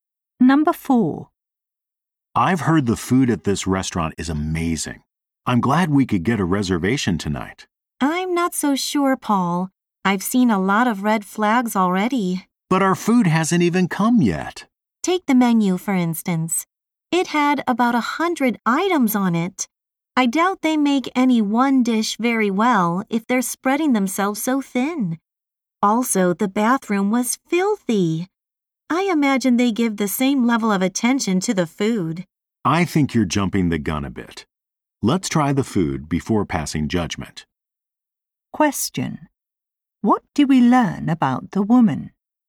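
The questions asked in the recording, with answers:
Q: What do we learn about the woman?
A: She doubts the food will be good.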